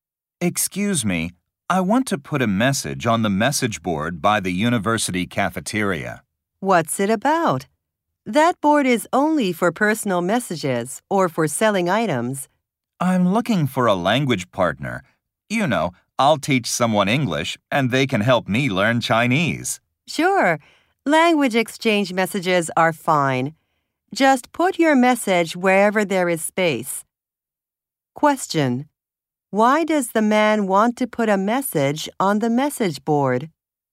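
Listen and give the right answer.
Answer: To find a language partner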